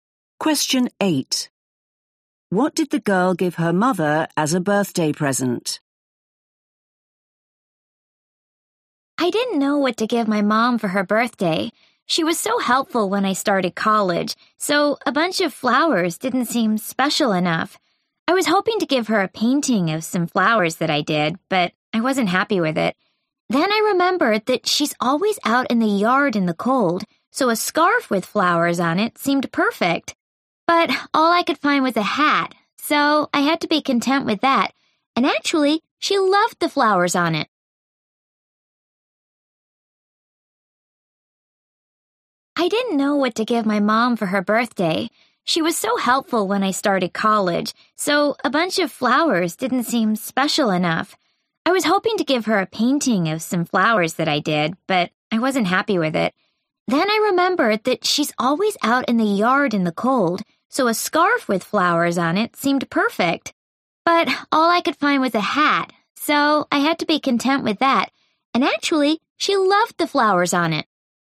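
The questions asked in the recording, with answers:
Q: What did the girl give her mother as a birthday present?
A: a hat with flowers on it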